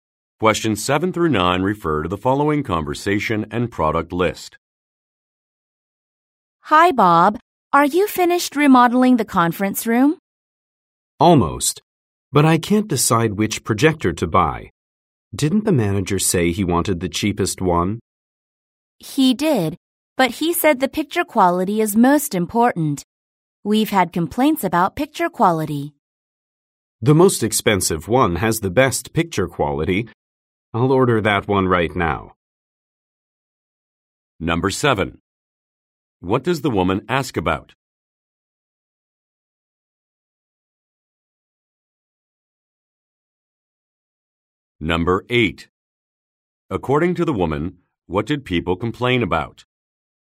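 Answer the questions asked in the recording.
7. Whether the conference room remodeling is finished.
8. Picture quality.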